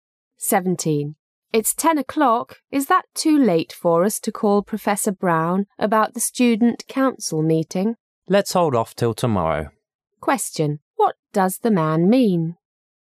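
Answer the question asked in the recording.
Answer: They should wait until tomorrow to call Professor Brown.

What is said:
Is that too late for us to call Professor Brown about the student council meeting? M: Let's hold off till tomorrow. Q: What does the man mean?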